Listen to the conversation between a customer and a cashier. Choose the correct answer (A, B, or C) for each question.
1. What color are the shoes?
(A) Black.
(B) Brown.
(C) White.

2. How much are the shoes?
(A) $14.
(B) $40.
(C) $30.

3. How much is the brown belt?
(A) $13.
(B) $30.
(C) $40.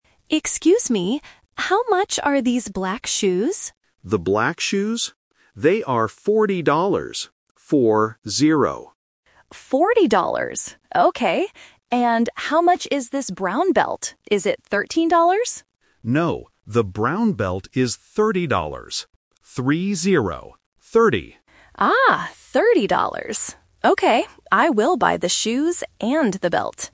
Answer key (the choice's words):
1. Black.
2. $40.
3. $30.

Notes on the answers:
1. The customer asks, "How much are these black shoes?" and the cashier repeats "The black shoes?". Option B (Brown) is the trap because it is the color of the belt. Option C is not mentioned.
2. The cashier says the shoes are "forty dollars" and repeats it as "Four-zero". Option C ($30) is the trap because it is the price of the belt. Option A is not mentioned, but "fourteen" sounds similar to "forty".
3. The cashier clearly says, "the brown belt is thirty dollars. Three-zero." Option A ($13) is the trap because the customer guesses "Is it thirteen dollars?", but the cashier says "No." Option C ($40) is the price of the shoes.

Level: A1